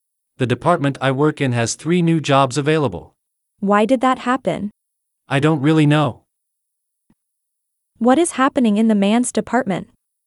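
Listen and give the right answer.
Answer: It has 3 new jobs available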